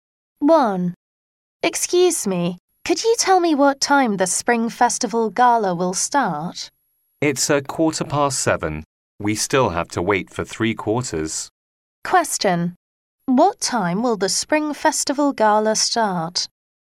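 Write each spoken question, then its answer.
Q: What time will the Spring Festival Gala start?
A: At 7:15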